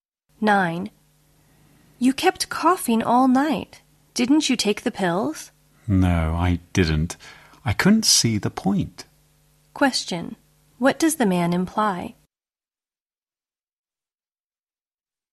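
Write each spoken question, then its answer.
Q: What does the man imply?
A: He didn't think the pills would help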